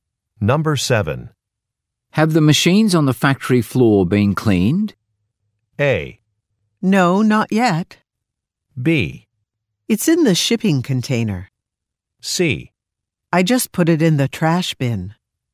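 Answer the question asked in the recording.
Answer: A: No, not yet.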